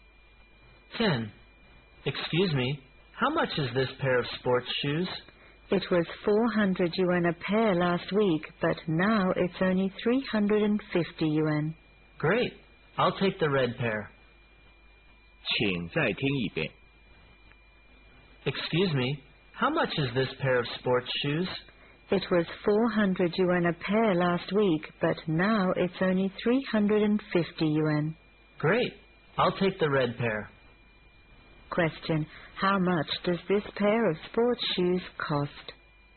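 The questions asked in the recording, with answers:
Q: How much does this pair of sports shoes cost?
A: 350 yuan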